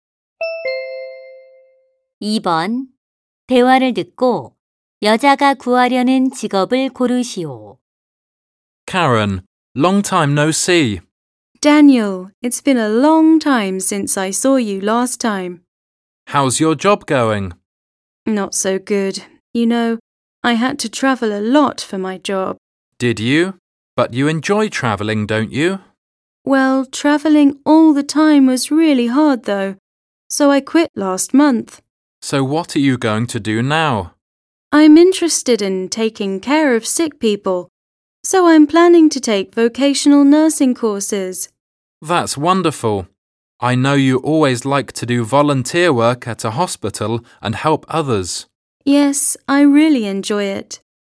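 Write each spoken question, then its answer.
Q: 대화를 듣고 여자가 구하려는 직업을 고르시오.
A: 간호사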